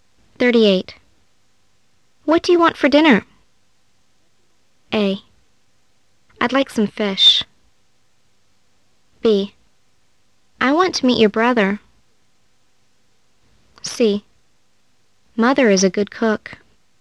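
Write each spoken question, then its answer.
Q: What do you want for dinner?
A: A: I'd like some fish.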